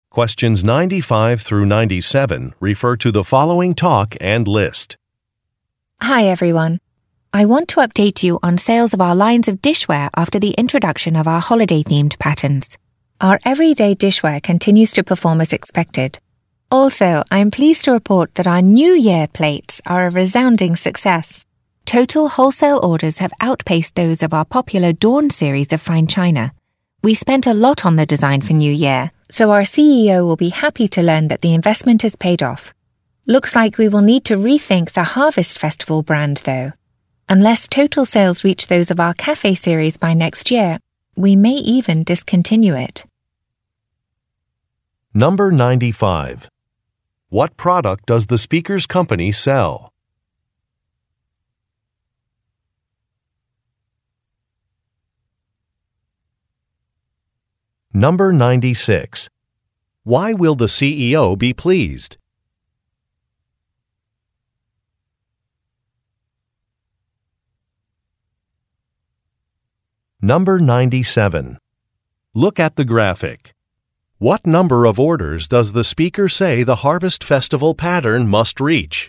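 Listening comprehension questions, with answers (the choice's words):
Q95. What product does the speaker's company sell?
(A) Bath towels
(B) Dishware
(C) Tablecloths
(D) Drinking glasses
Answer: Dishware

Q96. Why will the CEO be pleased?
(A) The company bought a new warehouse.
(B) Customer reviews have been positive.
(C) Shipping costs have gone down.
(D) An investment was successful.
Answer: An investment was successful.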